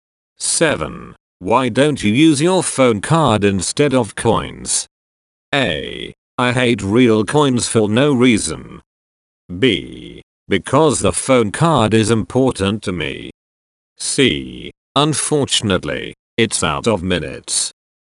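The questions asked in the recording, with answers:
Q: Why don't you use your phone card instead of coins?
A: C: Unfortunately, it's out of minutes.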